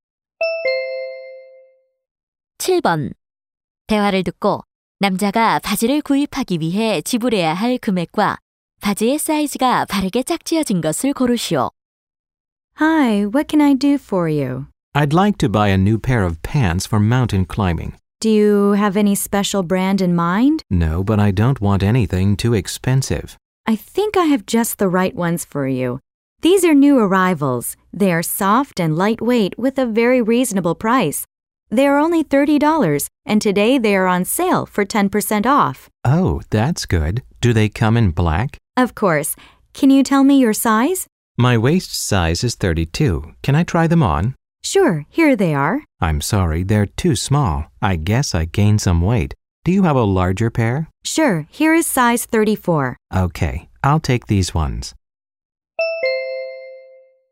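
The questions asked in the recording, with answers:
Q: 대화를 듣고 남자가 바지를 구입하기 위해 지불해야 할 금액과 바지의 사이즈가 바르게 짝지어진 것을 고르시오.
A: 27달러, 34 사이즈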